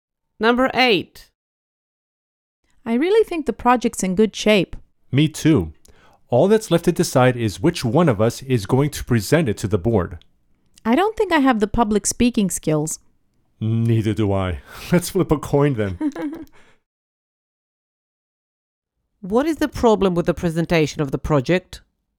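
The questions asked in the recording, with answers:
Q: What is the problem with the presentation of the project?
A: Neither of them thinks they can speak well in public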